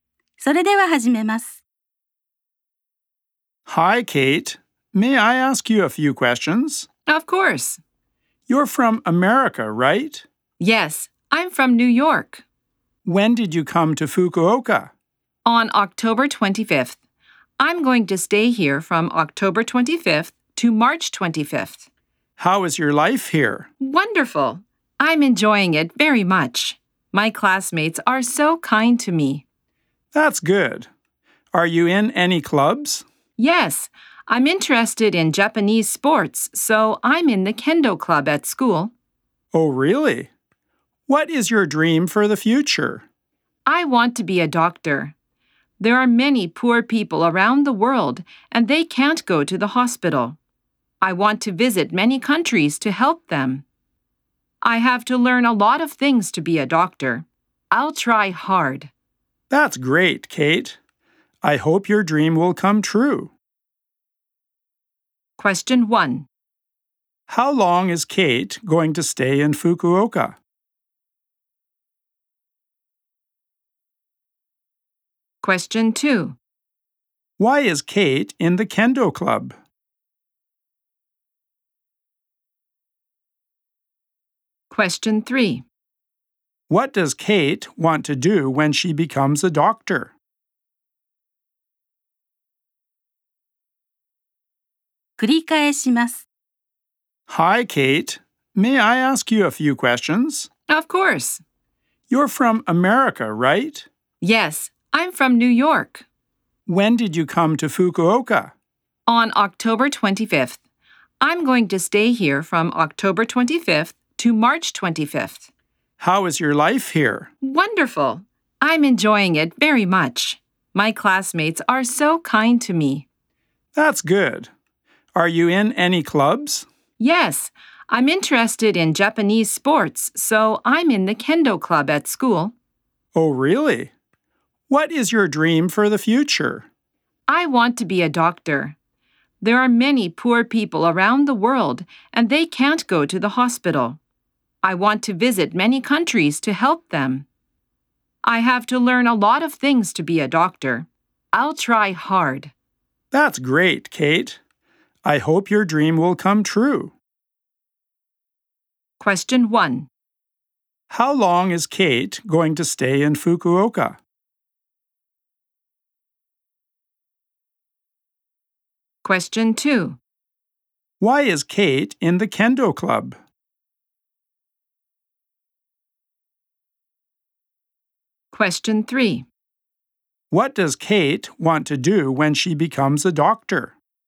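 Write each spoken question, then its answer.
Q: How long is Kate going to stay in Fukuoka?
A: Five months (from October 25th to March 25th).

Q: Why is Kate in the kendo club?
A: Because she is interested in Japanese sports.

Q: What does Kate want to do when she becomes a doctor?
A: Visit many countries to help poor people who can't go to the hospital.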